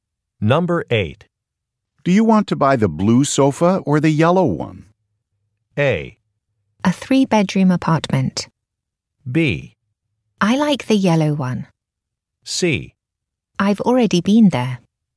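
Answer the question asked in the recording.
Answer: B: I like the yellow one.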